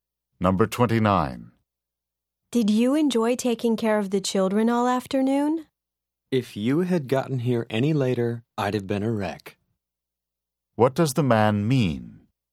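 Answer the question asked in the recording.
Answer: Looking after the children was very tiring for him.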